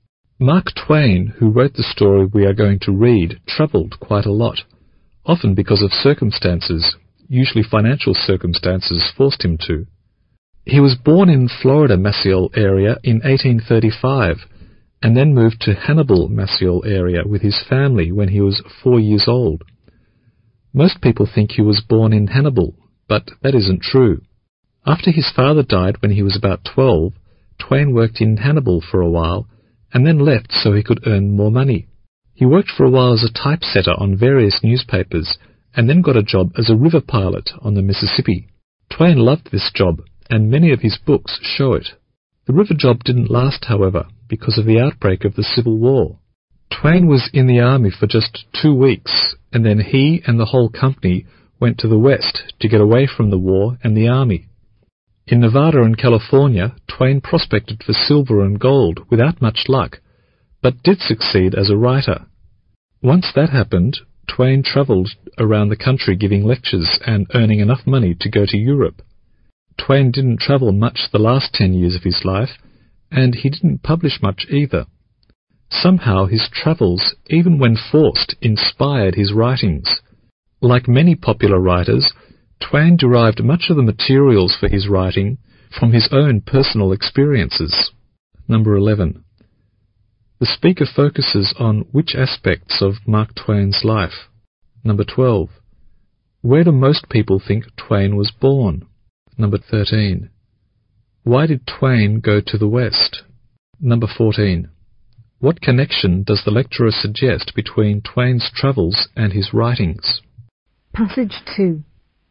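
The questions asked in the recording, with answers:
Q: The speaker focuses on which aspects of Mark Twain's life?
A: His travels and his writing

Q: Where do most people think Twain was born?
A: In Hannibal, Missouri

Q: Why did Twain go to the West?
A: To get away from the war and the army

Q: What connection does the lecturer suggest between Twain's travels and his writings?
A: His travels inspired his writings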